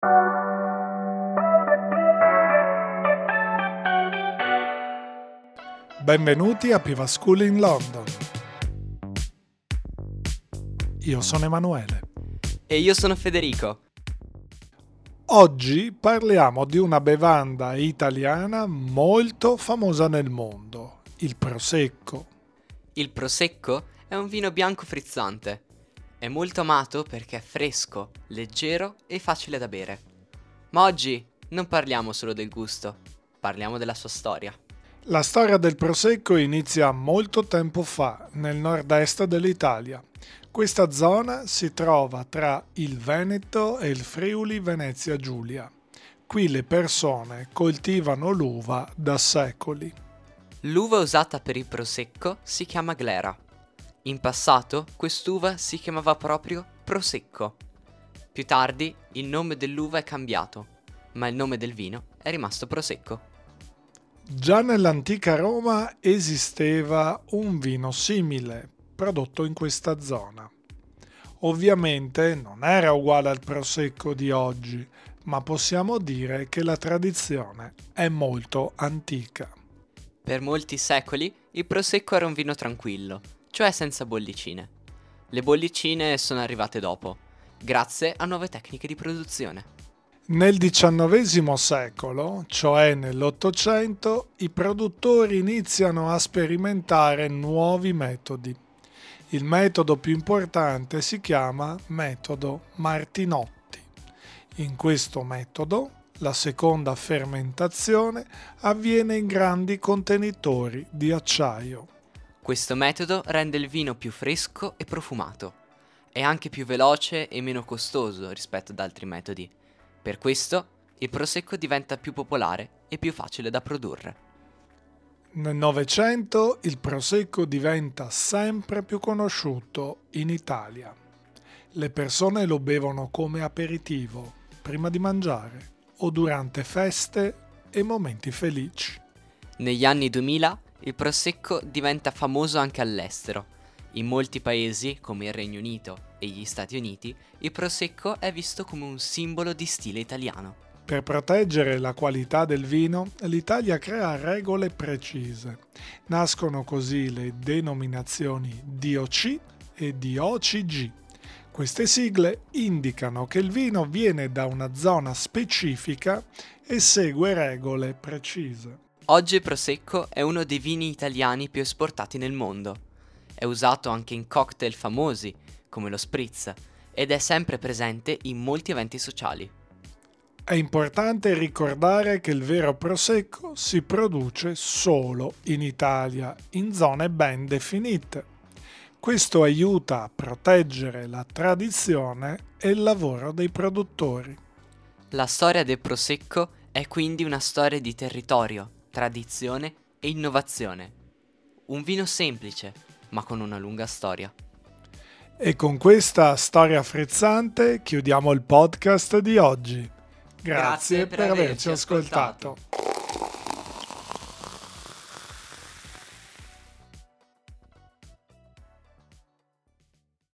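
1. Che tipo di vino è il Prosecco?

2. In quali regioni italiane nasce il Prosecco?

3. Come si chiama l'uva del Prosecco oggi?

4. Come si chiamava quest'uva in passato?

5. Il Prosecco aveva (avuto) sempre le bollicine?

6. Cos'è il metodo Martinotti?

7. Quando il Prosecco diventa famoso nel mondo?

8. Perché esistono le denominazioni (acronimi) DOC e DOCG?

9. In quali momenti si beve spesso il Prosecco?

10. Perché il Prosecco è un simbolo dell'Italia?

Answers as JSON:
{"1": "Un vino bianco frizzante", "2": "Veneto e Friuli Venezia Giulia", "3": "Glera", "4": "Prosecco", "5": "No, per molti secoli era un vino tranquillo, senza bollicine", "6": "Un metodo in cui la seconda fermentazione avviene in grandi contenitori di acciaio", "7": "Negli anni 2000", "8": "Per proteggere la qualità: indicano che il vino viene da una zona specifica e segue regole precise", "9": "Come aperitivo, durante feste e momenti felici", "10": "Perché è visto all'estero come simbolo di stile italiano e si produce solo in Italia"}

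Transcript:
Oggi parliamo di una bevanda italiana molto famosa nel mondo: il Prosecco.
Federico:
Il Prosecco è un vino bianco frizzante. È molto amato perché è fresco, leggero e facile da bere. Ma oggi non parliamo solo del gusto: parliamo della sua storia.
Emanuele:
La storia del Prosecco inizia molto tempo fa, nel nord-est dell'Italia. Questa zona si trova tra il Veneto e il Friuli-Venezia Giulia. Qui le persone coltivano l'uva da secoli.
Federico:
L'uva usata per il Prosecco si chiama Glera. In passato, quest'uva si chiamava proprio "Prosecco". Più tardi il nome dell'uva è cambiato, ma il nome del vino è rimasto Prosecco.
Emanuele:
Già nell'antica Roma esisteva un vino simile, prodotto in questa zona. Ovviamente non era uguale al Prosecco di oggi, ma possiamo dire che la tradizione è molto antica.
Federico:
Per molti secoli il Prosecco era un vino tranquillo, cioè senza bollicine. Le bollicine sono arrivate dopo, grazie a nuove tecniche di produzione.
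Emanuele:
Nel XIX secolo, cioè nell'Ottocento, i produttori iniziano a sperimentare nuovi metodi. Il metodo più importante si chiama metodo Martinotti. In questo metodo la seconda fermentazione avviene in grandi contenitori di acciaio.
Federico:
Questo metodo rende il vino più fresco e profumato. È anche più veloce e meno costoso rispetto ad altri metodi. Per questo il Prosecco diventa più popolare e più facile da produrre.
Emanuele:
Nel Novecento il Prosecco diventa sempre più conosciuto in Italia. Le persone lo bevono come aperitivo, prima di mangiare, o durante feste e momenti felici.
Federico:
Negli anni 2000 il Prosecco diventa famoso anche all'estero. In molti paesi, come il Regno Unito e gli Stati Uniti, il Prosecco è visto come un simbolo di stile italiano.
Emanuele:
Per proteggere la qualità del vino, l'Italia crea regole precise. Nascono così le denominazioni DOC e DOCG. Queste sigle indicano che il vino viene da una zona specifica e segue regole precise.
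Federico:
Oggi il Prosecco è uno dei vini italiani più esportati nel mondo. È usato anche in cocktail famosi, come lo Spritz, ed è presente in molti eventi sociali.
Emanuele:
È importante ricordare che il vero Prosecco si produce solo in Italia, in zone ben definite. Questo aiuta a proteggere la tradizione e il lavoro dei produttori.
Federico:
La storia del Prosecco è quindi una storia di territorio, tradizione e innovazione. Un vino semplice, ma con una lunga storia.
Emanuele:
E con questa storia frizzante chiudiamo il podcast di oggi. Grazie per averci ascoltato!

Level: A2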